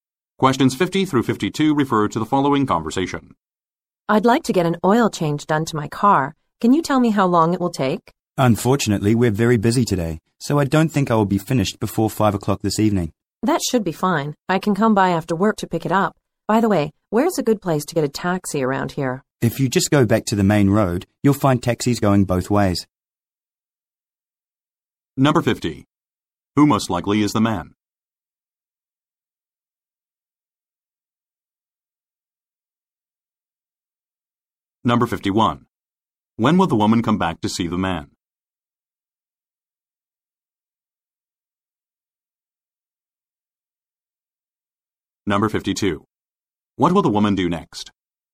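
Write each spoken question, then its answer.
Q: Who most likely is the man?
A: A car mechanic

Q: When will the woman come back to see the man?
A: After work, after 5 o'clock

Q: What will the woman do next?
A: Get a taxi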